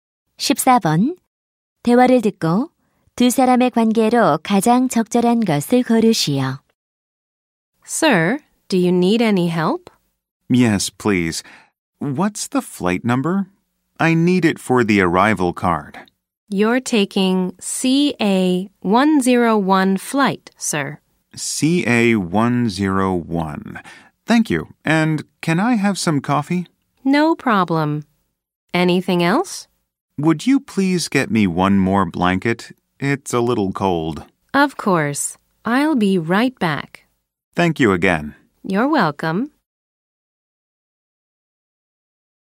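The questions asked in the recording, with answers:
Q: 대화를 듣고 두 사람의 관계로 가장 적절한 것을 고르시오.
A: 승무원 - 승객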